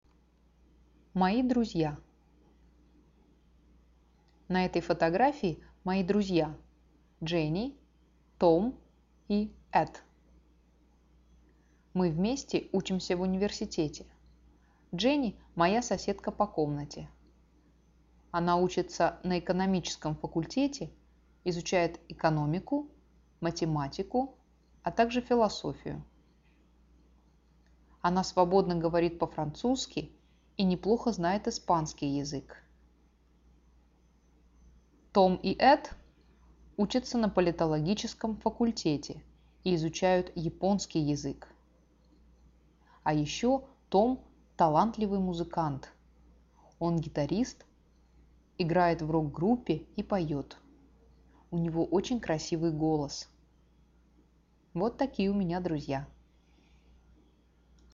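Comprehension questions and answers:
Now listen to the story and click on the statements that are TRUE.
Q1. Jenny is Sara's room-mate.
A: True

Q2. Sara works with Jenny.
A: False

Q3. Sara and her friends Tom, Ed and Jenny study at the same university.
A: True

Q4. Jenny speaks Japanese.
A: False

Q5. Jenny speaks French and Spanish.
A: True

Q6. Tom is a musician.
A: True

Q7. Tom plays guitar.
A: True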